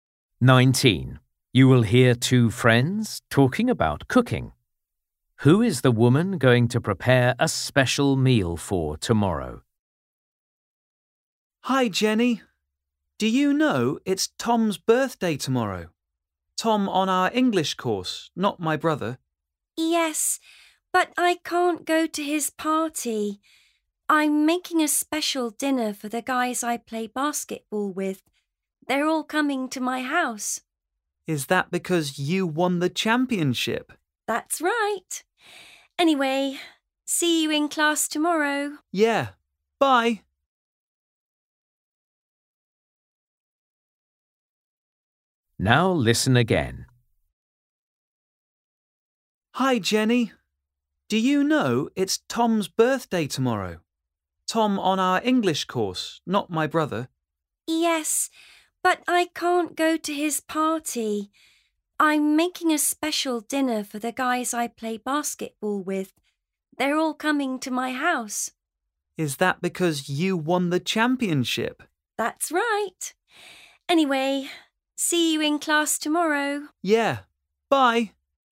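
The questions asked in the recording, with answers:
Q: Who is the woman going to prepare a special meal for tomorrow?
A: Her basketball teammates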